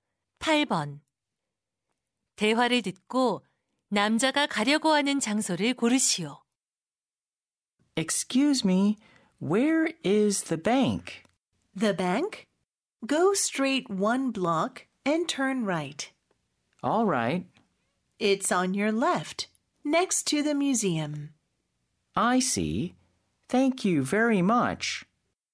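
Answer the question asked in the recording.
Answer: 은행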